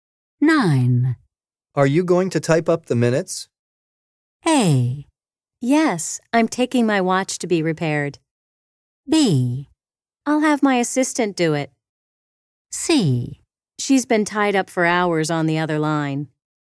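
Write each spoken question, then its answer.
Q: Are you going to type up the minutes?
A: B: I'll have my assistant do it.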